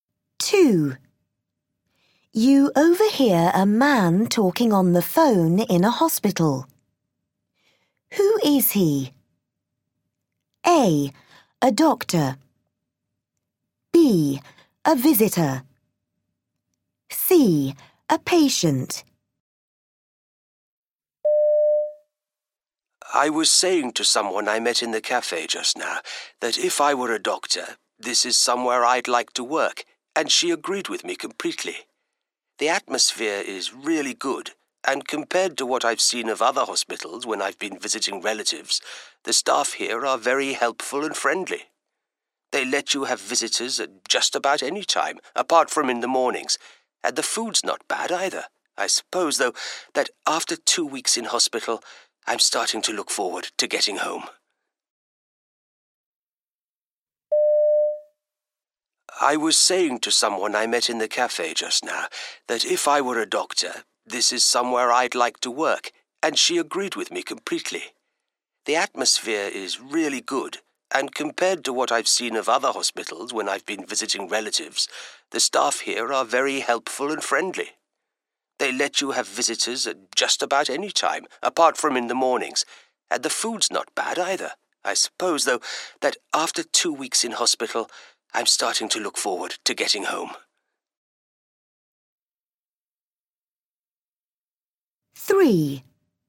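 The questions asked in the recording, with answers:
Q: Who is he?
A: C: A patient.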